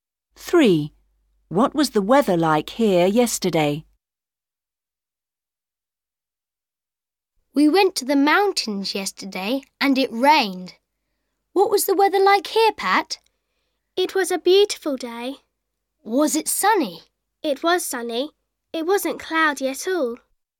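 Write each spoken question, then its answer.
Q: What was the weather like here yesterday?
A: sunny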